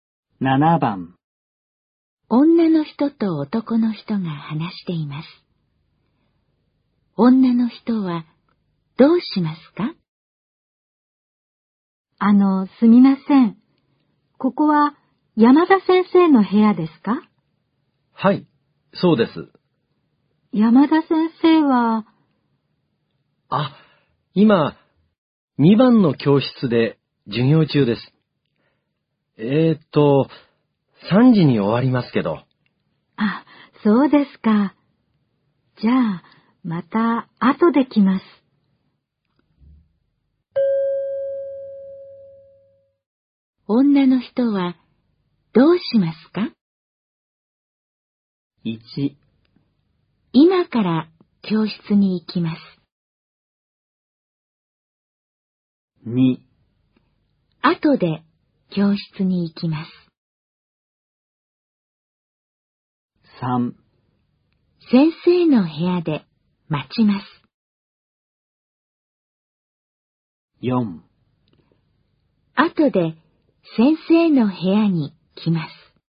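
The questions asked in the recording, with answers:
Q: 女の人はどうしますか?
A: 4: 後で先生の部屋に来ます。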